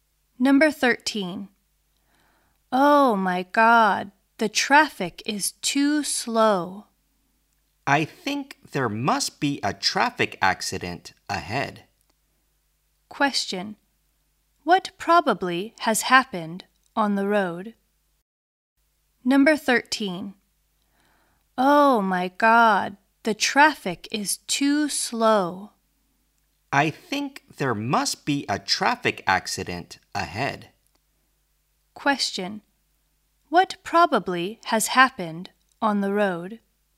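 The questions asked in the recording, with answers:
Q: What probably has happened on the road?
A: A traffic accident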